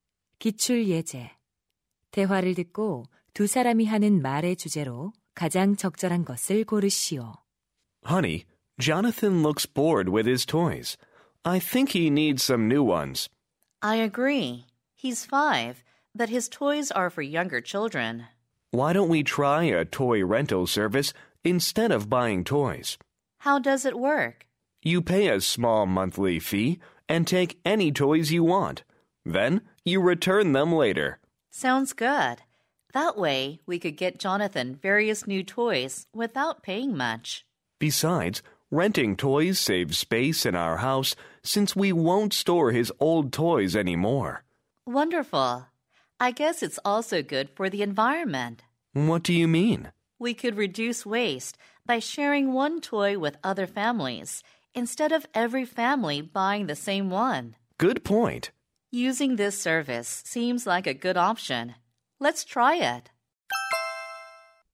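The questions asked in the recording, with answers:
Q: 대화를 듣고 두 사람이 하는 말의 주제로 가장 적절한 것을 고르시오.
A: 장난감 대여 서비스 이용의 장점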